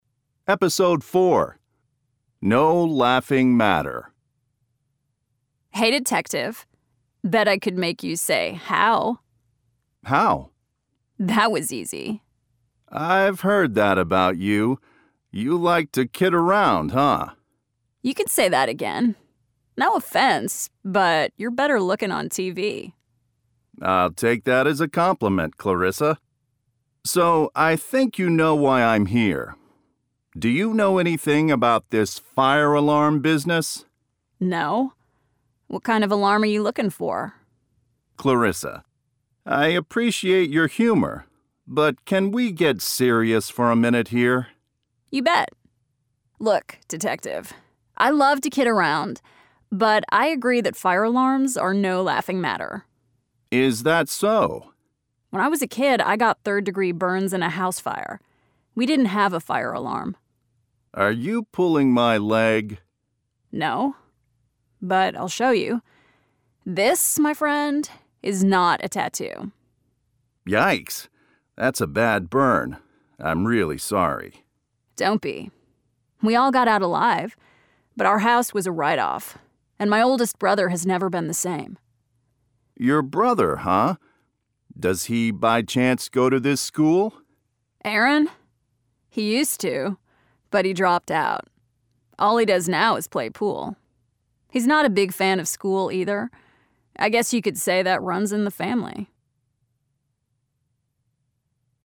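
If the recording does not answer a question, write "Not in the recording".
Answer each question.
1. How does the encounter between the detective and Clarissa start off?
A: Clarissa jokes that she can make him say "how", and he does.

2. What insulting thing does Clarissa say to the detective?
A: That he's better looking on TV.

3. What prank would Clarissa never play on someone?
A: Setting off a false fire alarm.

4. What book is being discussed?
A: Not in the recording

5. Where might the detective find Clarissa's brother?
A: Playing pool (at a pool hall).

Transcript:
CLARISSA: Hey, Detective. Bet I could make you say "how."
DETECTIVE BOSSLEY: How?
CLARISSA: That was easy.
DETECTIVE BOSSLEY: I've heard that about you. You like to kid around, huh?
CLARISSA: You can say that again. No offense, but you're better-looking on TV.
DETECTIVE BOSSLEY: 'll take that as a compliment, Clarissa. So, I think you know why I'm here. 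Do you know anything about this fire alarm business?
CLARISSA: No. What kind of alarm are you looking for?
DETECTIVE BOSSLEY: Clarissa. I appreciate your humor, but can we get serious for a minute here?
CLARISSA: You bet. Look, Detective. I love to kid around, but I agree that fire alarms are no laughing matter.
DETECTIVE BOSSLEY: Is that so?
CLARISSA: When I was a kid I got third-degree burns in a house fire. We didn't have a fire alarm.
DETECTIVE BOSSLEY: Are you pulling my leg?
CLARISSA: No, but I'll show you. This, my friend, is not a tattoo.
DETECTIVE BOSSLEY: Yikes. That's a bad burn. I'm really sorry.
CLARISSA: Don't be. We all got out alive, but our house was a write-off. And my oldest brother has never been the same.
DETECTIVE BOSSLEY: Your brother, huh? Does he, by chance, go to this school?
CLARISSA: Aaron? He used to, but he dropped out. All he does now is play pool. He's not a big fan of school either. 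I guess you could say that runs in the family.

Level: Intermediate (B2)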